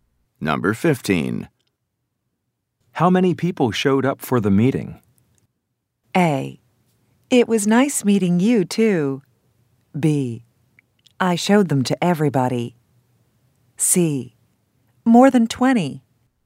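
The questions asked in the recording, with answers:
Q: How many people showed up for the meeting?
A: C: More than 20.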